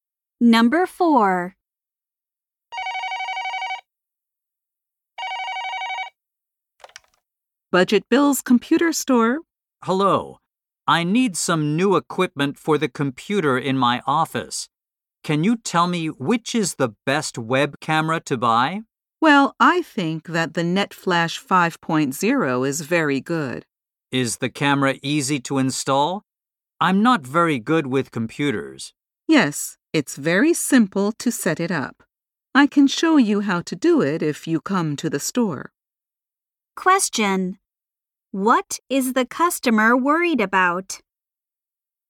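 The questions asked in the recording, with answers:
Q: What is the customer worried about?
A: Whether the camera is easy to install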